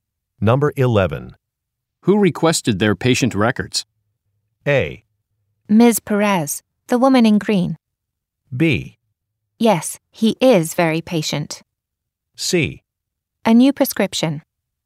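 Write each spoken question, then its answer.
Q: Who requested their patient records?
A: A: Ms. Perez, the woman in green.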